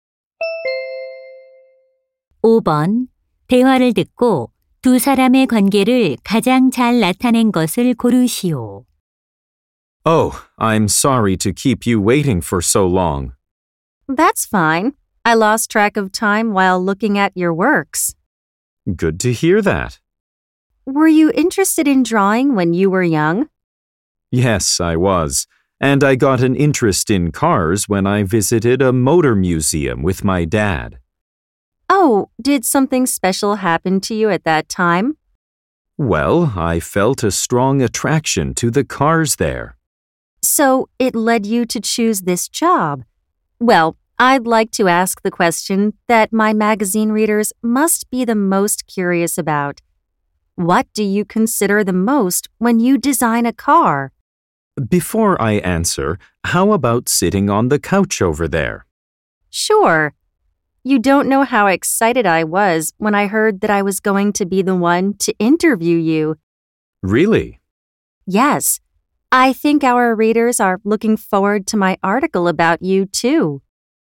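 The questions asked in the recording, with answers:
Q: 대화를 듣고 두 사람의 관계를 가장 잘 나타낸 것을 고르시오.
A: 자동차 디자이너 - 잡지 기자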